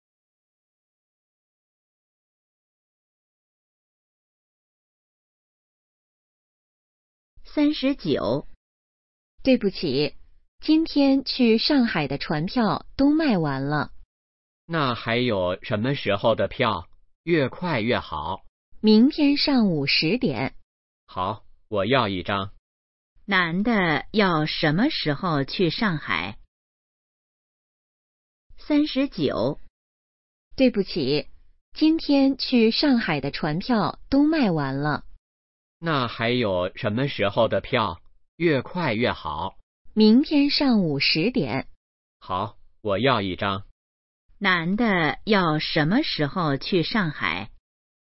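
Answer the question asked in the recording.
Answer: 明天上午10点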